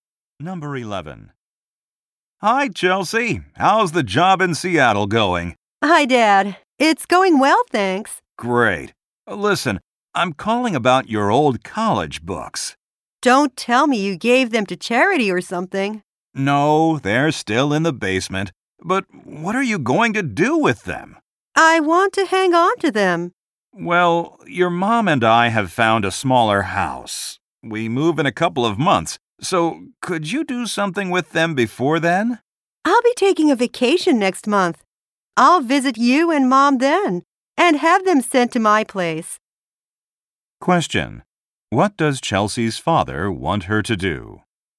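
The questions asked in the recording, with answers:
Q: What does Chelsea's father want her to do?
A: Do something with her old college books before they move.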